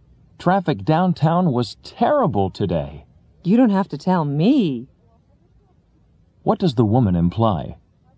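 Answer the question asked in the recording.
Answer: She already knows the traffic was terrible.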